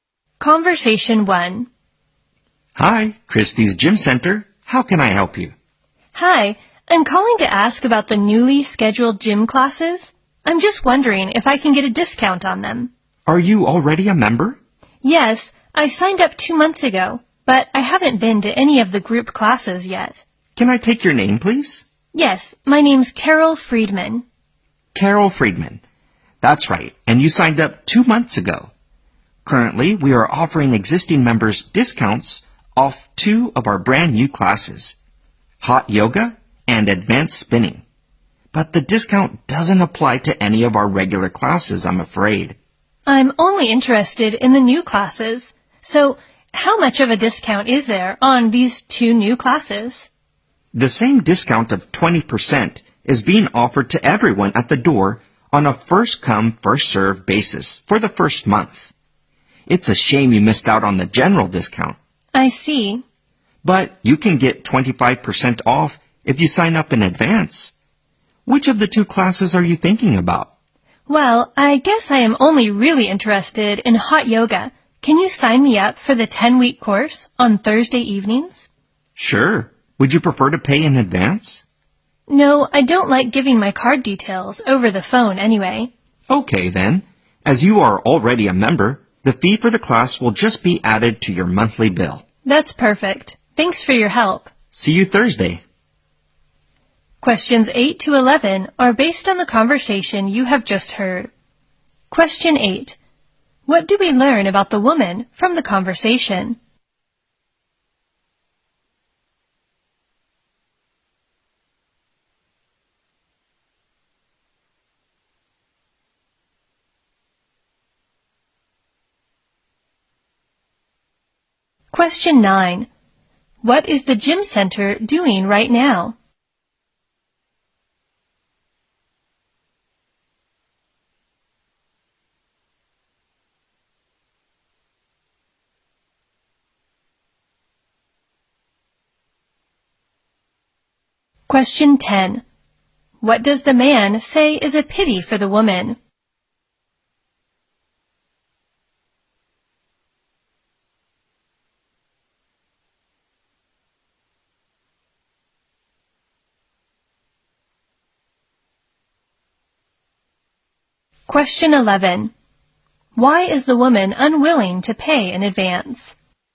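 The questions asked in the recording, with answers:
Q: What is the gym center doing right now?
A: Offering discounts on two new classes

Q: What does the man say is a pity for the woman?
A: She missed the general discount

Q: Why is the woman unwilling to pay in advance?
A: She doesn't like giving her card details over the phone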